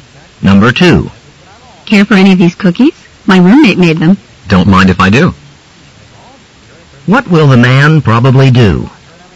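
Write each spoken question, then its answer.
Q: What will the man probably do?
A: Eat a cookie.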